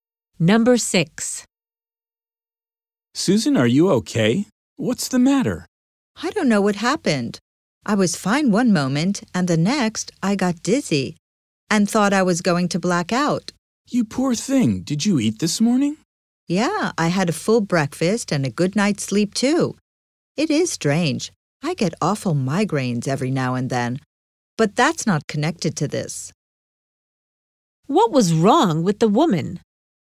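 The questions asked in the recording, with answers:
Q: What was wrong with the woman?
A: She felt dizzy and almost fainted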